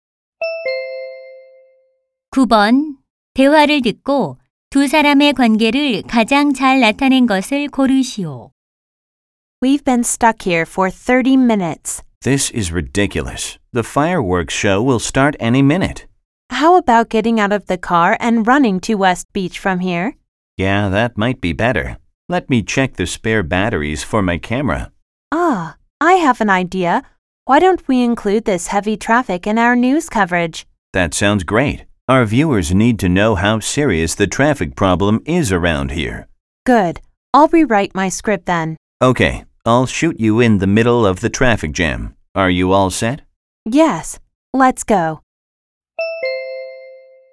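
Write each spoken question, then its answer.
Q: 대화를 듣고 두 사람의 관계를 가장 잘 나타낸 것을 고르시오.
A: 방송 기자 - 카메라 기자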